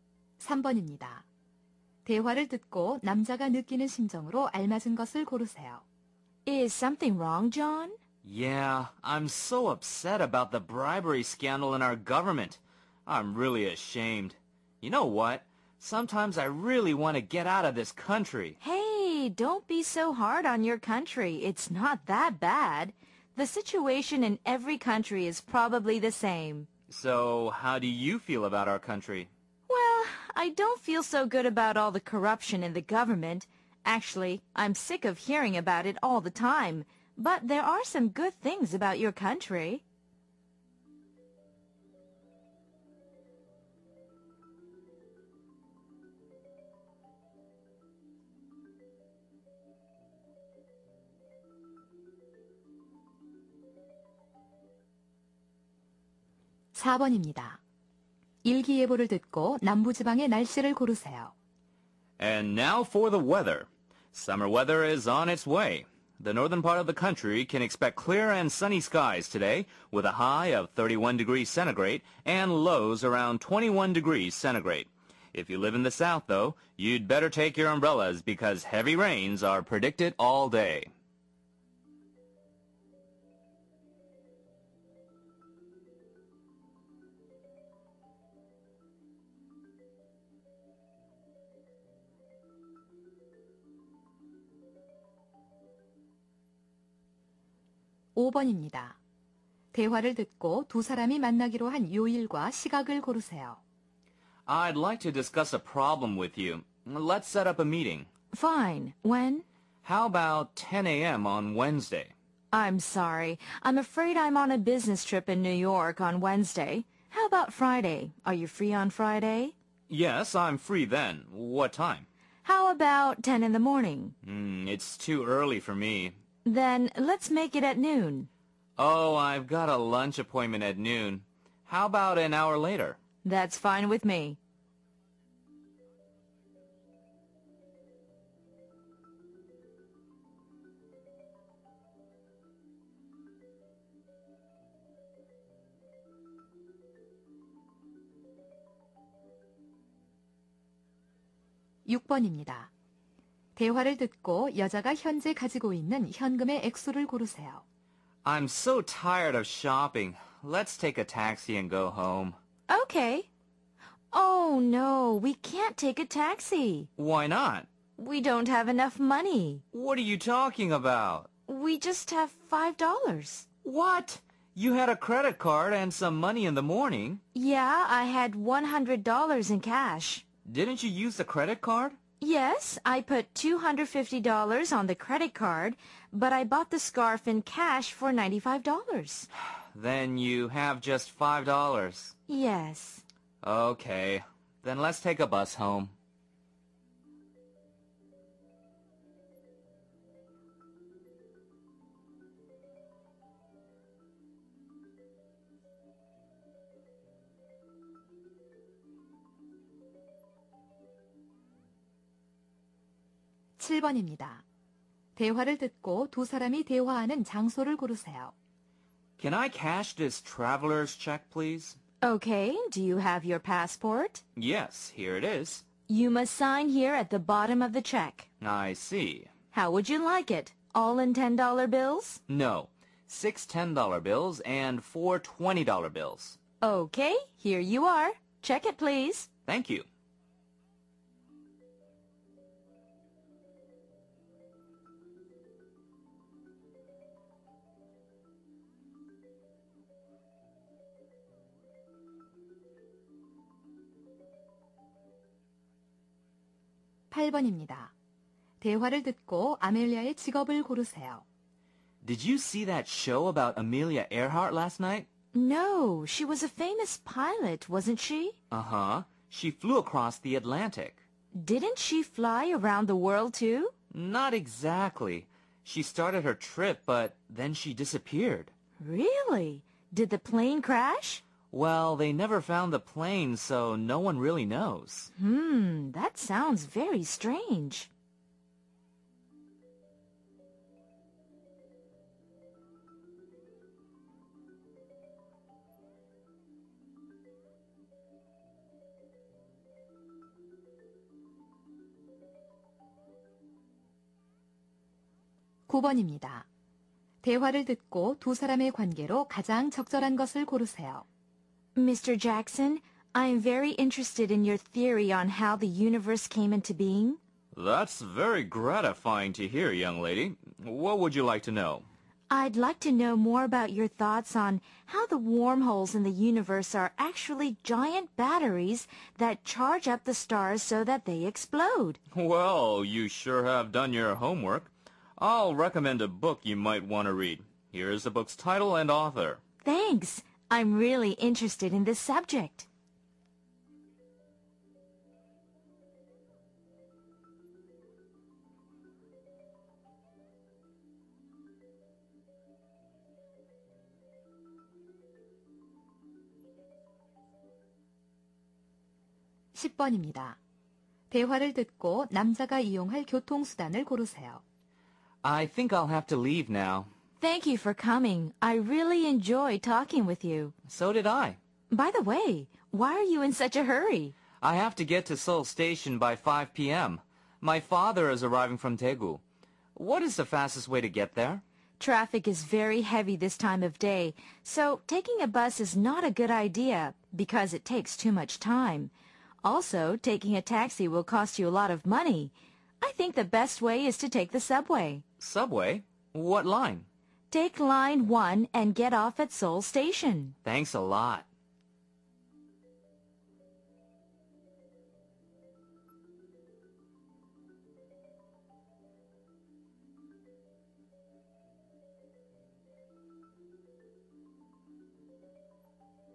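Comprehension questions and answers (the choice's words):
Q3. 대화를 듣고, 남자가 느끼는 심정으로 알맞은 것을 고르시오.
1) ashamed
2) revengeful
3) delighted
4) sorrowful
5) astonished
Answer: ashamed

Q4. 일기예보를 듣고, 남부 지방의 날씨를 고르시오.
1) fine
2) snowy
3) rainy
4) sunny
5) cloudy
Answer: rainy

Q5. 대화를 듣고, 두 사람이 만나기로 한 요일과 시각을 고르시오.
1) 수요일 정오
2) 금요일 정오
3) 수요일 오전10시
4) 금요일 오전10시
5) 금요일 오후1시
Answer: 금요일 오후1시

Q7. 대화를 듣고, 두 사람이 대화하는 장소를 고르시오.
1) 은행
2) 극장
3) 세관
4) 경찰서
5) 소방서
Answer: 은행

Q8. 대화를 듣고, Amelia의 직업을 고르시오.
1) 선원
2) 비행사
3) 원예가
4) 간호사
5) 탐험가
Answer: 비행사

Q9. 대화를 듣고, 두 사람의 관계로 가장 적절한 것을 고르시오.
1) patient-doctor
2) designer-singer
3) scientist-artist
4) professor-student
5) salesman-customer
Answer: professor-student

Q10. 대화를 듣고, 남자가 이용할 교통수단을 고르시오.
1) on foot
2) by bus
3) by taxi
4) by train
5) by subway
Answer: by subway

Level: 3학년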